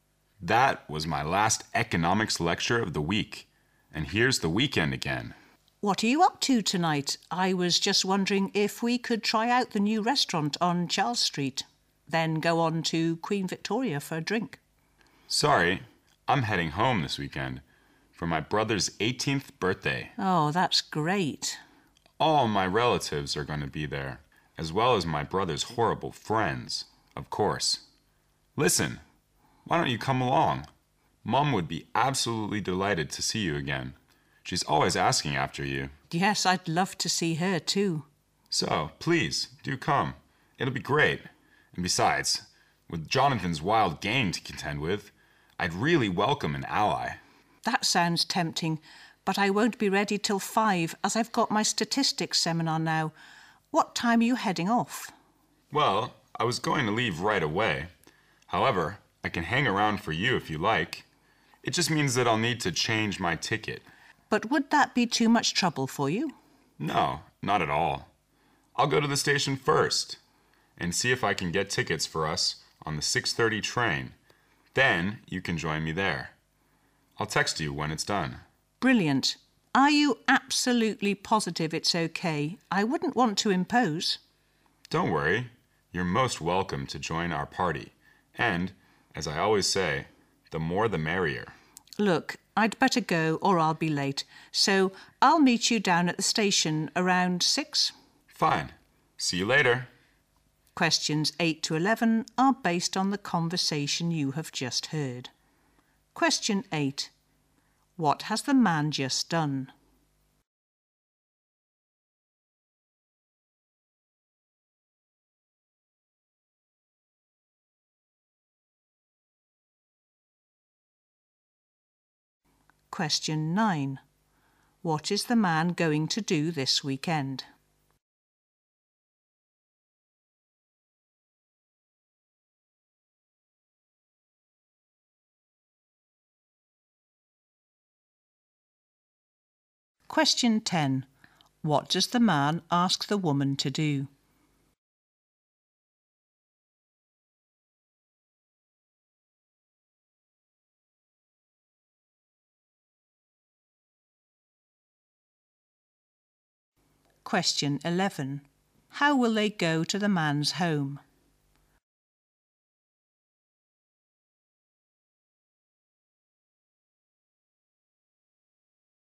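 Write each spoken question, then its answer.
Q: What has the man just done?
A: Attended his last economics lecture of the week

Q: What is the man going to do this weekend?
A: Go home for his brother's 18th birthday

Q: What does the man ask the woman to do?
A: Come along with him to the party

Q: How will they go to the man's home?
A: By train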